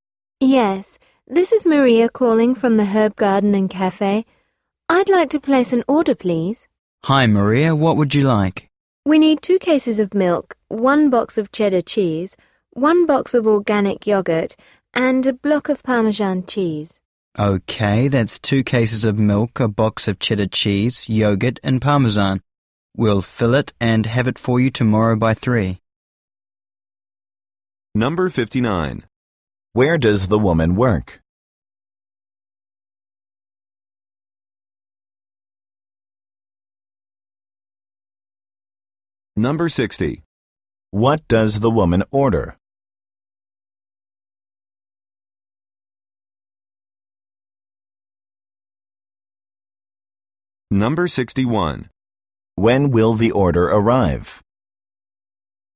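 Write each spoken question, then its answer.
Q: Where does the woman work?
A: At the Herb Garden and Cafe

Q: What does the woman order?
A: Dairy products: 2 cases of milk, cheddar cheese, organic yogurt, and Parmesan cheese

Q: When will the order arrive?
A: Tomorrow by 3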